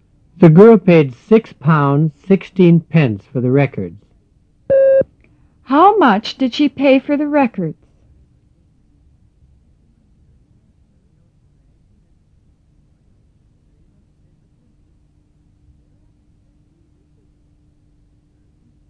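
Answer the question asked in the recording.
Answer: £6.16.

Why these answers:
The girl paid six pounds sixteen pence for the records.

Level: 入门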